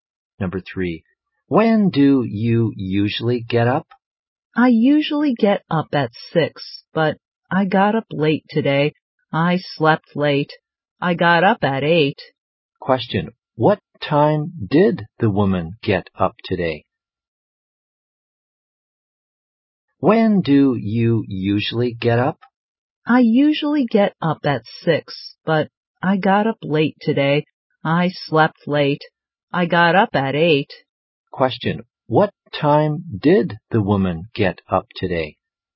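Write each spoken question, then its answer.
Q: what time did the woman get up today?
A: At 8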